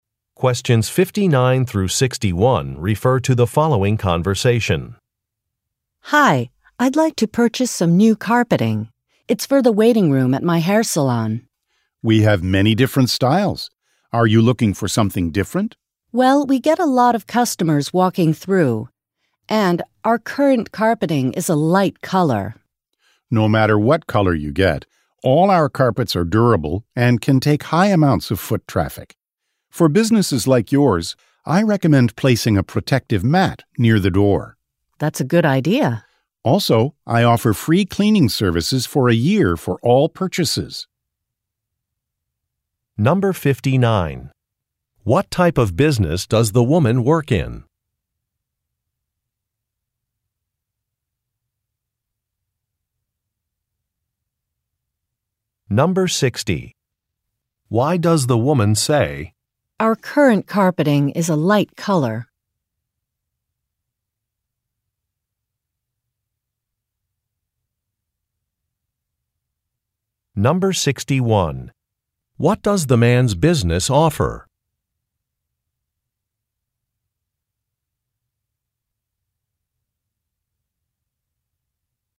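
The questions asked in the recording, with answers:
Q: What type of business does the woman work in?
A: A hair salon

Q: What does the man's business offer?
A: Free cleaning services for a year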